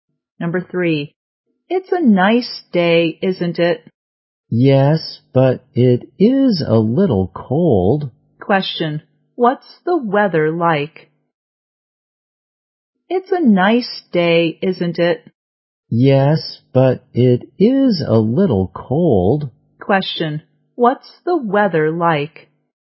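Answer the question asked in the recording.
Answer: Nice but a little cold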